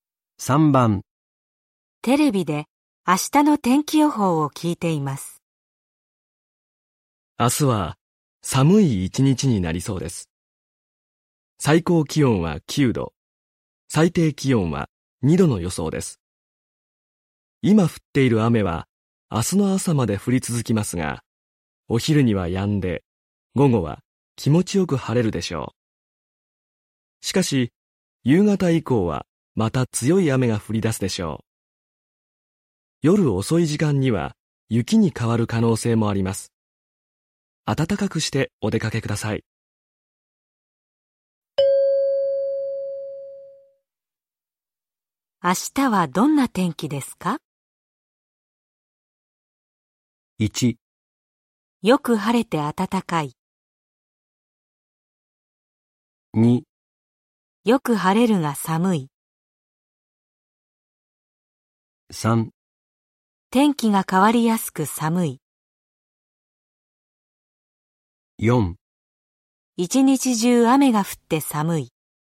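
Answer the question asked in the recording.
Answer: 3: 天気が変わりやすく寒い。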